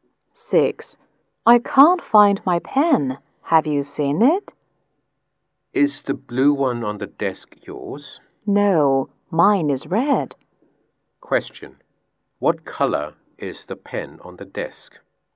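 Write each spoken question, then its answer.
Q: What color is the pen on the desk?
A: Blue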